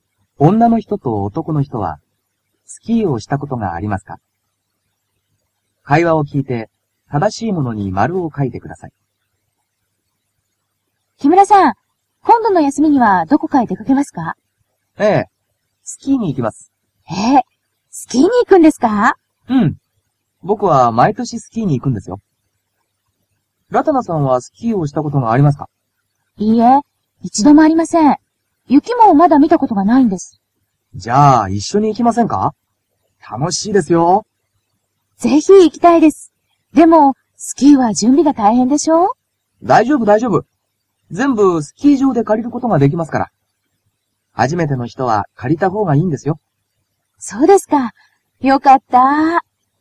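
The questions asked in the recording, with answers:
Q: 女の人と男の人はスキーをしたことがありますか?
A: 男の人(木村さん)はあります(毎年行く)。女の人(ラタナさん)は一度もありません。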